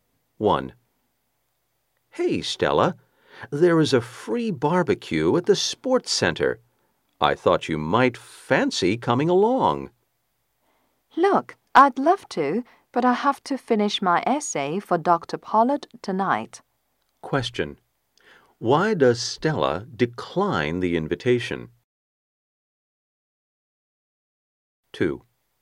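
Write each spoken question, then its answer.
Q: Why does Stella decline the invitation?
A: She has to finish her essay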